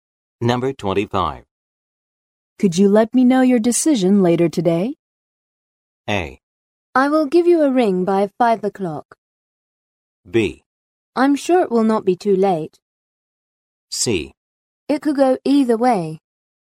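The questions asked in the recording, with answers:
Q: Could you let me know your decision later today?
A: A: I will give you a ring by 5 o'clock.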